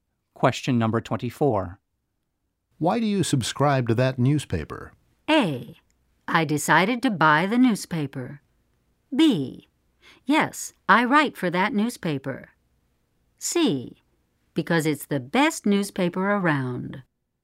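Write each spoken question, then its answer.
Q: Why do you subscribe to that newspaper?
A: C: Because it's the best newspaper around.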